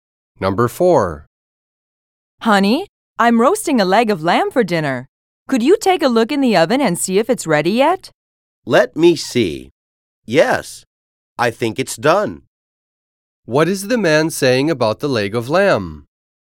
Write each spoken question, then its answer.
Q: What is the man saying about the leg of lamb?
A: When the man says that the leg of lamb is done, he means that it is cooked and ready to eat.